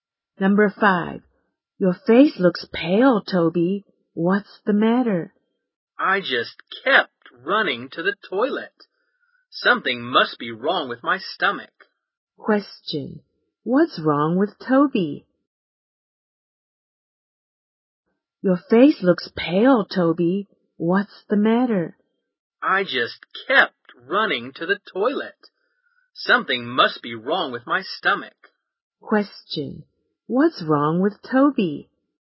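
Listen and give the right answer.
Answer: Something is wrong with his stomach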